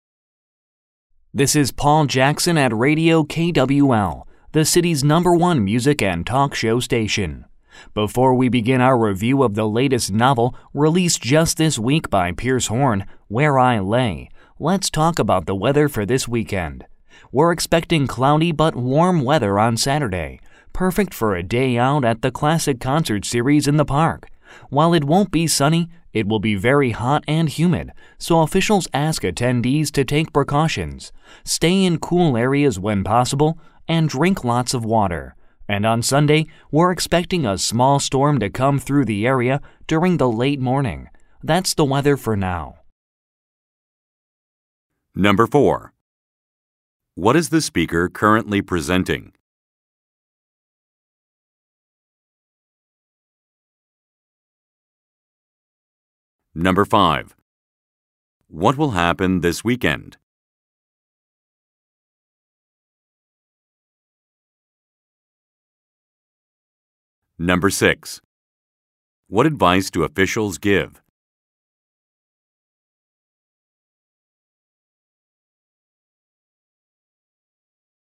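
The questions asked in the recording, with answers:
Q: What is the speaker currently presenting?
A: A weather report

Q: What will happen this weekend?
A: A classic concert series in the park

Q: What advice do officials give?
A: Stay in cool areas and drink lots of water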